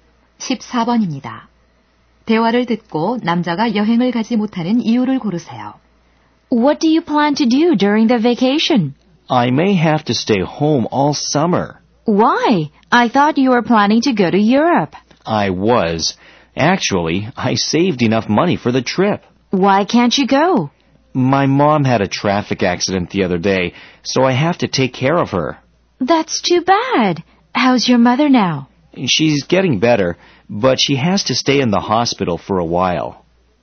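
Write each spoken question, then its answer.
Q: 대화를 듣고 남자가 여행을 가지 못하는 이유를 고르세요.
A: 교통사고를 당한 어머니를 돌봐야 해서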